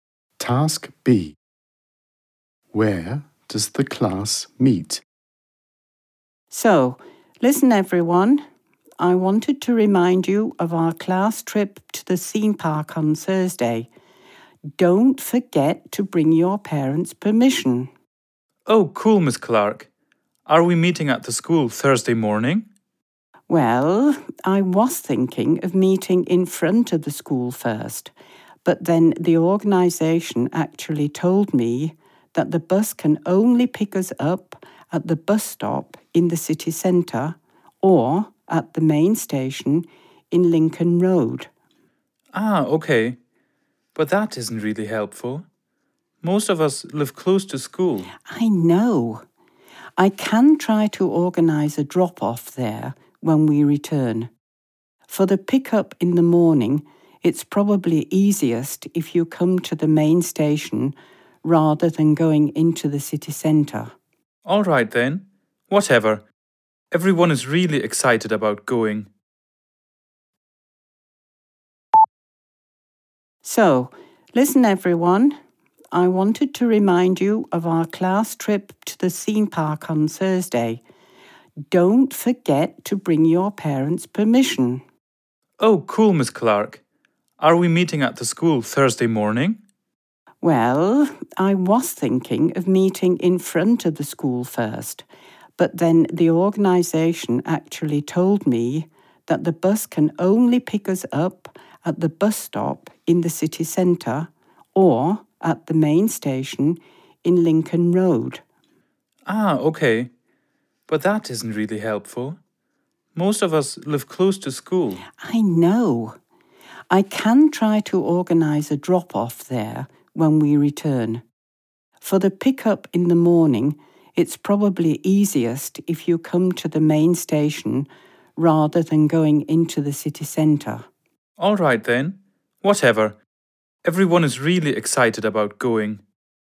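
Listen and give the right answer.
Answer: At the main station in Lincoln Road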